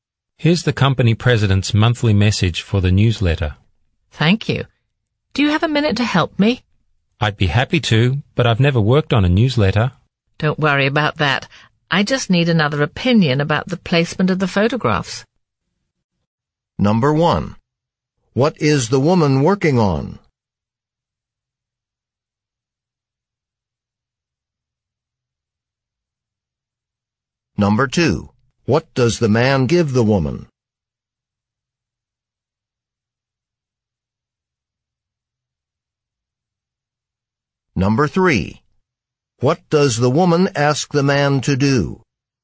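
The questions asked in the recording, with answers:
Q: What is the woman working on?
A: A newsletter

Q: What does the man give the woman?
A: The company president's monthly message

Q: What does the woman ask the man to do?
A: Give his opinion on where to place the photographs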